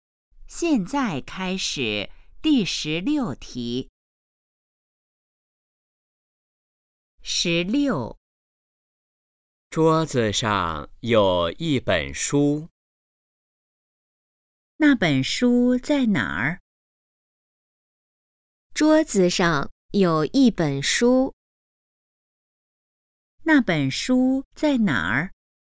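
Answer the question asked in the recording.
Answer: 桌子上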